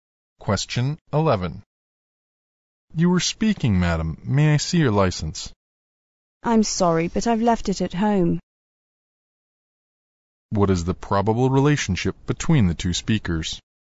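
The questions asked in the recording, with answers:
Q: What is the probable relationship between the two speakers?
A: Police officer and driver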